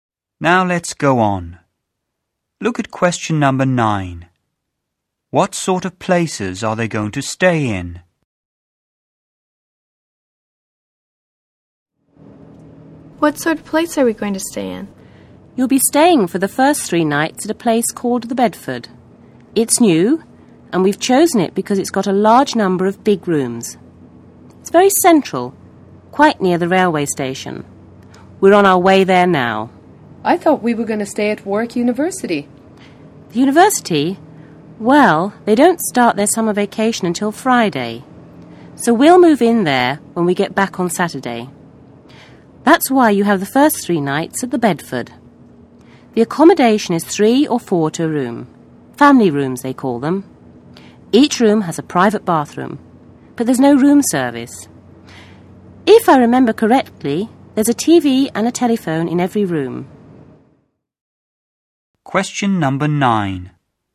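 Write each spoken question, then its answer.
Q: What sort of places are they going to stay in?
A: A hotel (the Bedford) for the first 3 nights, then Warwick University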